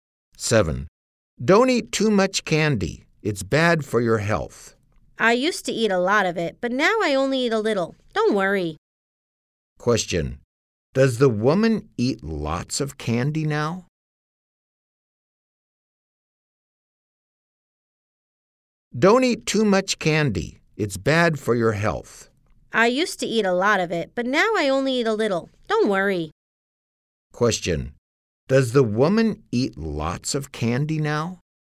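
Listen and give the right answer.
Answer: No, she only eats a little now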